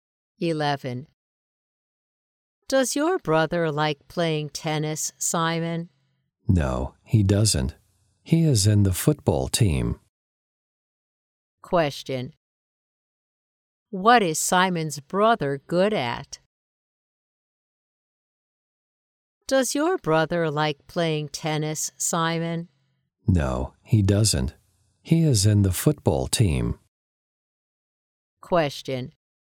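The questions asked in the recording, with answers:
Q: What is Simon's brother good at?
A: Football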